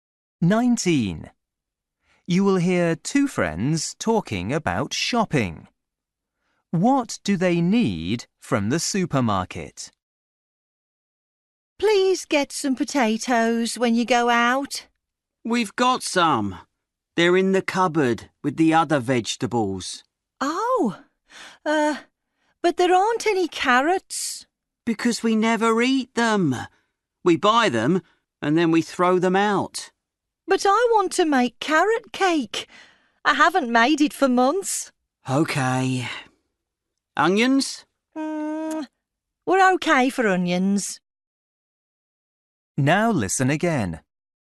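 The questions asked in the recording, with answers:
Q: What do they need from the supermarket?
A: carrots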